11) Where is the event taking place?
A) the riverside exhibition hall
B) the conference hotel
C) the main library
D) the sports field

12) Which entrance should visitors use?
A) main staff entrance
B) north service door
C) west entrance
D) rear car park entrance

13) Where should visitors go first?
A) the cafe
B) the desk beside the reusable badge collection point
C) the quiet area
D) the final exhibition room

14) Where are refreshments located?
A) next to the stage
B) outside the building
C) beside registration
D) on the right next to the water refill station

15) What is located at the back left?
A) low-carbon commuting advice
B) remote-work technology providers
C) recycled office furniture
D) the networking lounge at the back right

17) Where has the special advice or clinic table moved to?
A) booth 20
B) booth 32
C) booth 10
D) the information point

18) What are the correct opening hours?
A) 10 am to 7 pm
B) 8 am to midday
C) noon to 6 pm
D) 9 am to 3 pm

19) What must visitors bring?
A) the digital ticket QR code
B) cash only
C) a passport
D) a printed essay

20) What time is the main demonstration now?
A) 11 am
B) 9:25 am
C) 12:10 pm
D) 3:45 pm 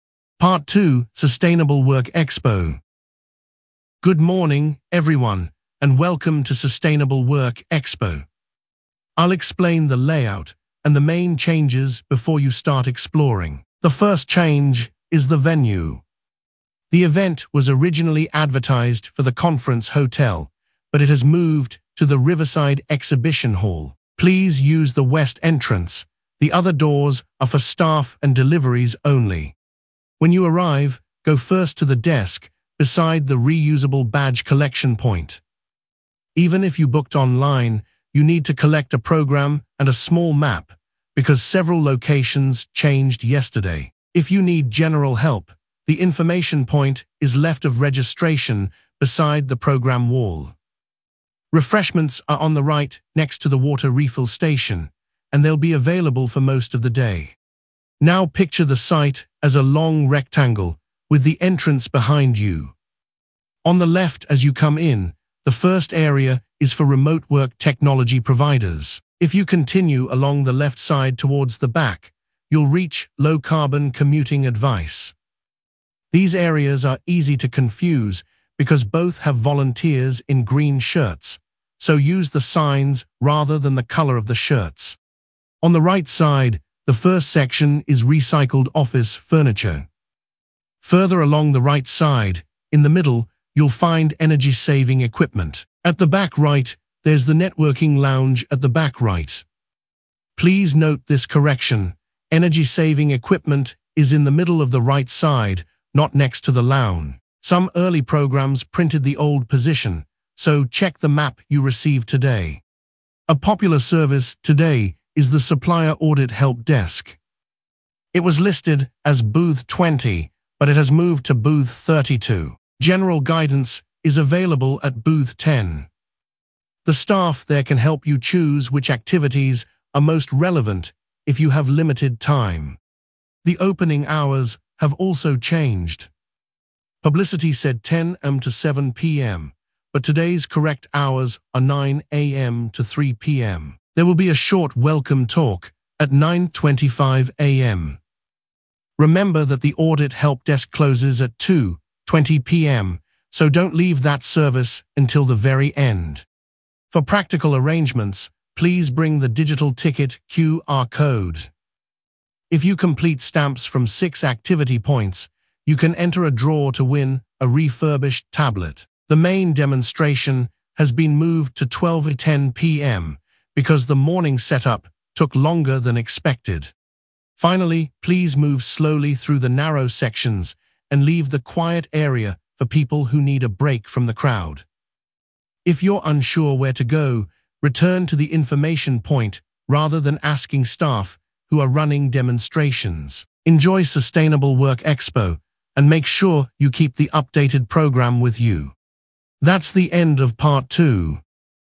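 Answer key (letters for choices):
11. A
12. C
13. B
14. D
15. A
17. B
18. D
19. A
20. C

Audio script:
Part 2: Sustainable Work Expo
Host: Good morning, everyone, and welcome to Sustainable Work Expo. I will explain the layout and the main changes before you start exploring. The first change is the venue. The event was originally advertised for the conference hotel, but it has moved to the riverside exhibition hall. Please use the west entrance; the other doors are for staff and deliveries only.
Host: When you arrive, go first to the desk beside the reusable badge collection point. Even if you booked online, you need to collect a programme and a small map, because several locations changed yesterday. If you need general help, the information point is left of registration beside the programme wall. Refreshments are on the right next to the water refill station, and they will be available for most of the day.
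Host: Now picture the site as a long rectangle, with the entrance behind you. On the left as you come in, the first area is for remote-work technology providers. If you continue along the left side towards the back, you will reach low-carbon commuting advice. These areas are easy to confuse because both have volunteers in green shirts, so use the signs rather than the colour of the shirts.
Host: On the right side, the first section is recycled office furniture. Further along the right side, in the middle, you will find energy-saving equipment. At the back right there is the networking lounge at the back right. Please note this correction: energy-saving equipment is in the middle of the right side, not next to the lounge. Some early programmes printed the old position, so check the map you receive today.
Host: A popular service today is the supplier audit help desk. It was listed as booth 20, but it has moved to booth 32. 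General guidance is available at booth 10. The staff there can help you choose which activities are most relevant if you have limited time.
Host: The opening hours have also changed. Publicity said 10 am to 7 pm, but today's correct hours are 9 am to 3 pm. There will be a short welcome talk at 9:25 am. Remember that the audit help desk closes at 2:20 pm, so do not leave that service until the very end.
Host: For practical arrangements, please bring the digital ticket QR code. If you complete stamps from six activity points, you can enter a draw to win a refurbished tablet. The main demonstration has been moved to 12:10 pm because the morning setup took longer than expected.
Host: Finally, please move slowly through the narrow sections and leave the quiet area for people who need a break from the crowd. If you are unsure where to go, return to the information point rather than asking staff who are running demonstrations. 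Enjoy Sustainable Work Expo, and make sure you keep the updated programme with you.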